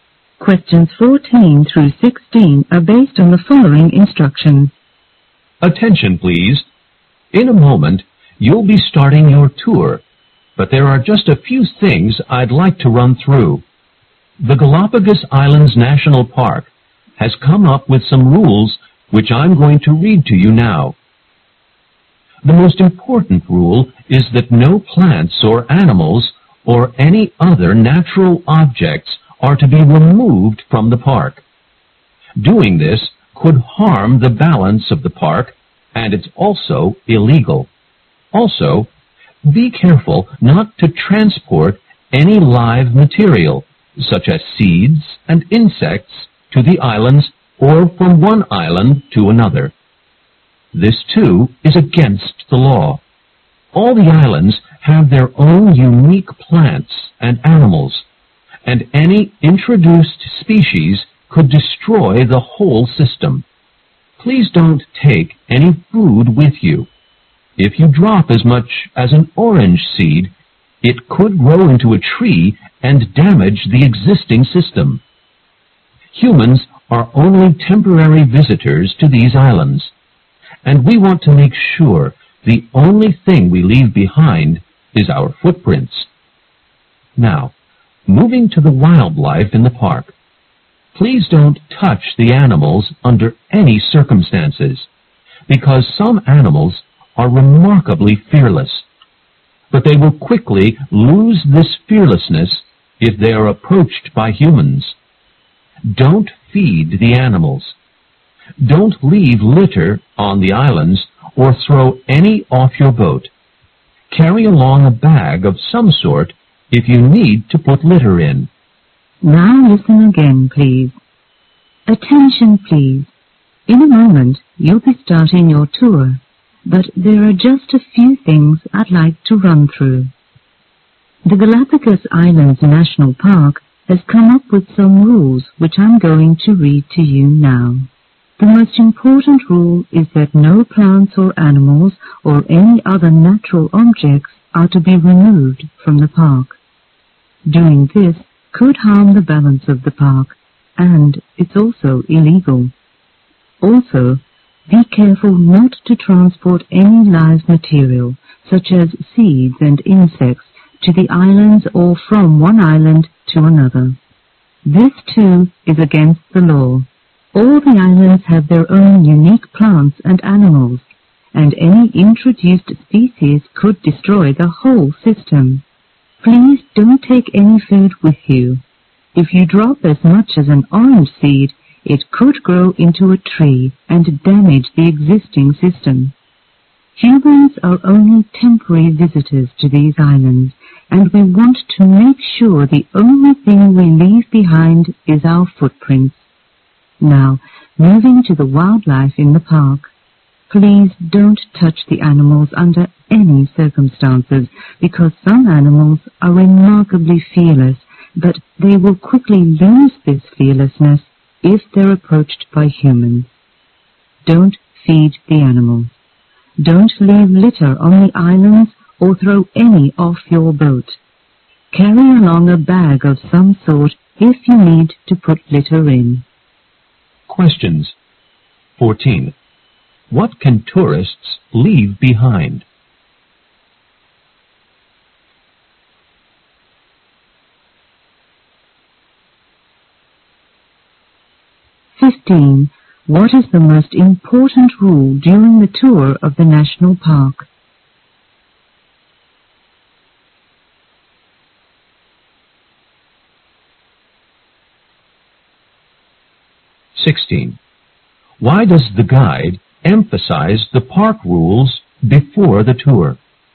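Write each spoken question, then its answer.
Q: What can tourists leave behind?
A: Their footprints

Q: What is the most important rule during the tour of the national park?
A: No plants, animals or other natural objects may be removed from the park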